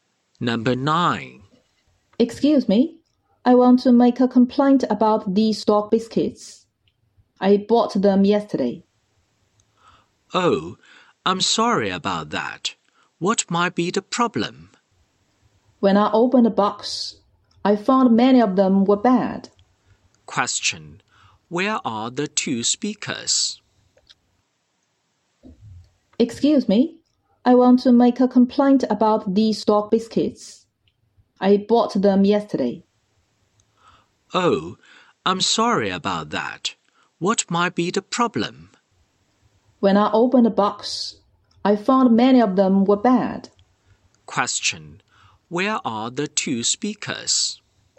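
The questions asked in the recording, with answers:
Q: Question, where are the two speakers?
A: In a shop (a pet shop).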